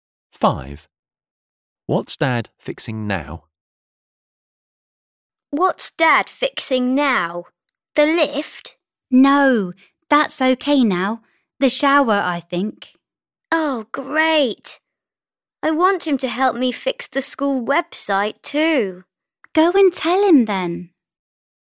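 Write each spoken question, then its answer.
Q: What's Dad fixing now?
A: The shower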